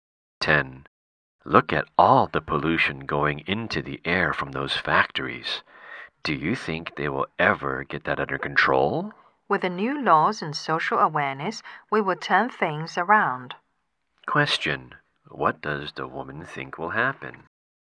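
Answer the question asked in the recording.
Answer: The pollution will be brought under control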